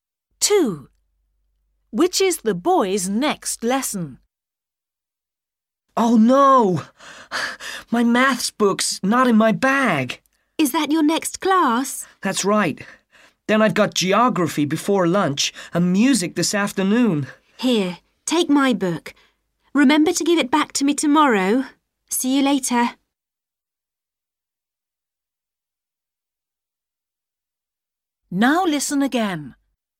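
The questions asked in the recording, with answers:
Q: Which is the boy's next lesson?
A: maths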